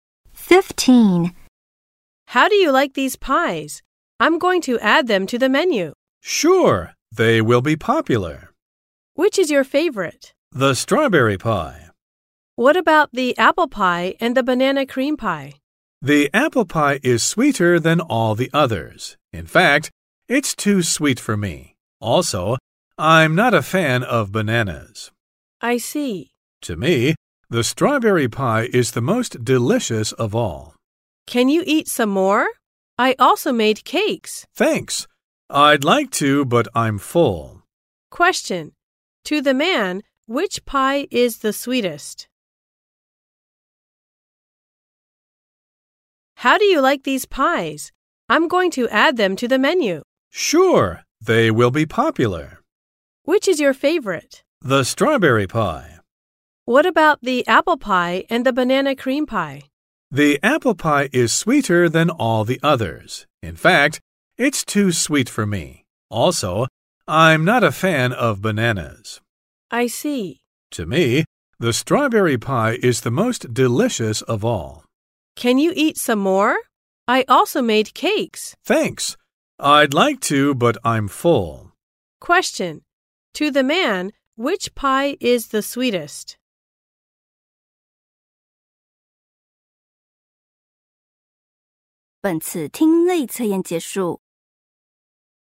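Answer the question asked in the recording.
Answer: The apple pie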